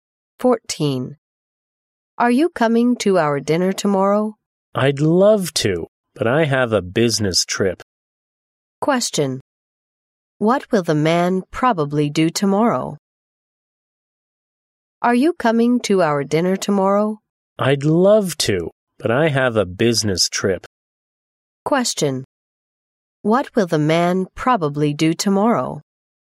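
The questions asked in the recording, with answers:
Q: What will the man probably do tomorrow?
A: Go on a business trip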